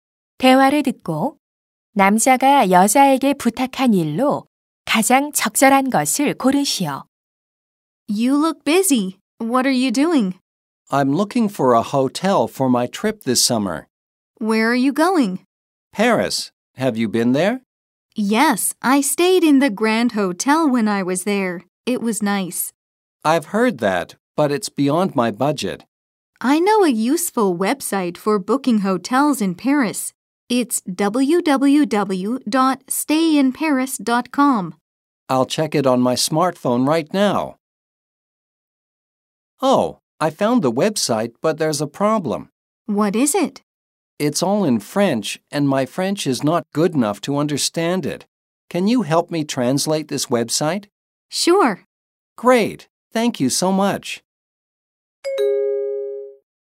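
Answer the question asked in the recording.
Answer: 웹사이트 번역 도와주기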